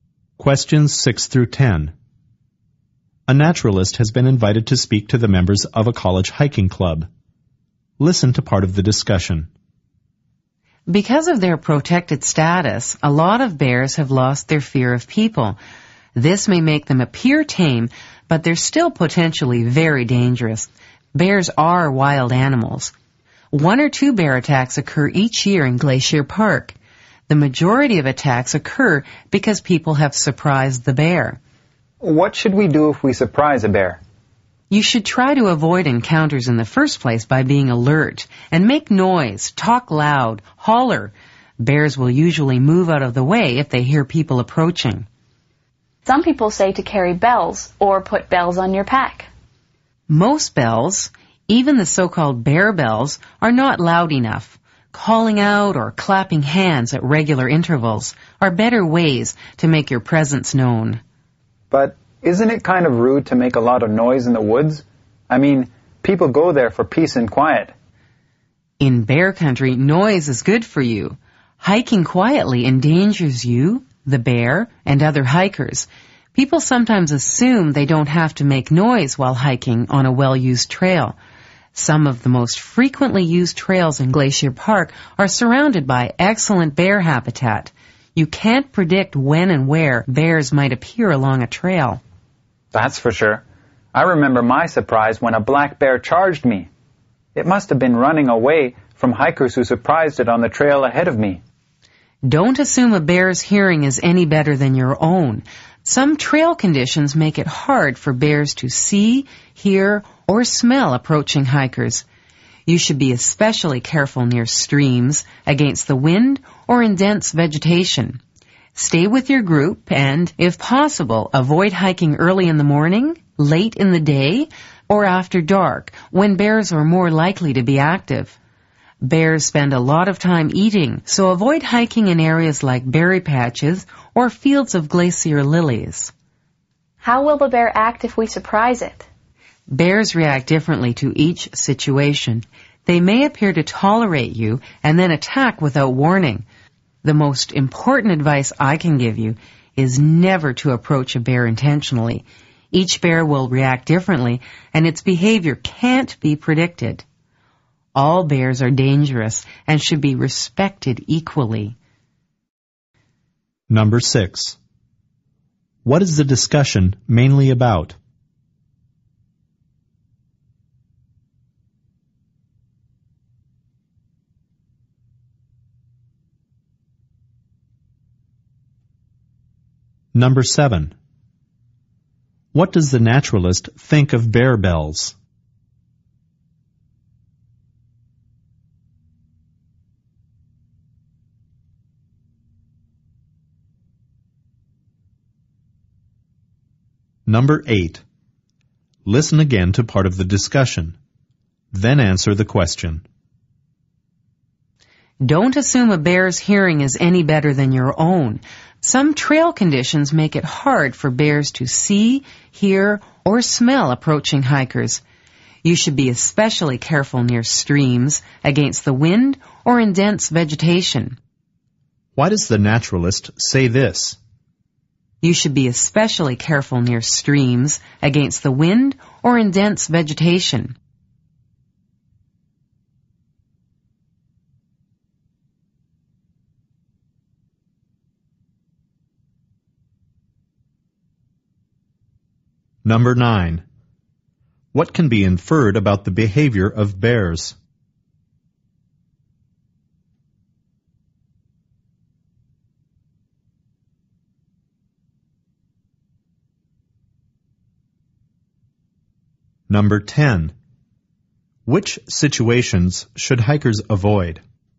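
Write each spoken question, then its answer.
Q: What is the discussion mainly about?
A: How to avoid surprising bears and bear attacks while hiking

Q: What does the naturalist think of bear bells?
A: They are not loud enough

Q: Why does the naturalist say this?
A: Because in those conditions bears may not detect approaching hikers

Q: What can be inferred about the behavior of bears?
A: It cannot be predicted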